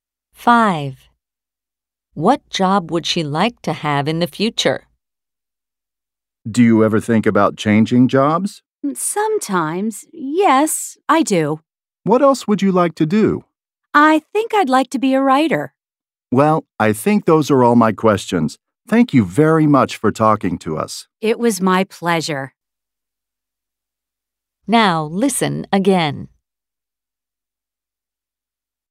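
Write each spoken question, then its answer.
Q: What job would she like to have in the future?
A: A writer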